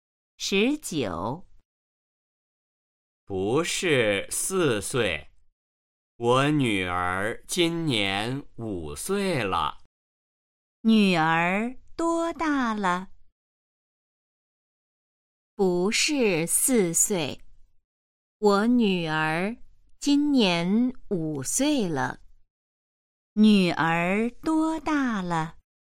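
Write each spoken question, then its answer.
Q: 女儿多大了?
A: 五岁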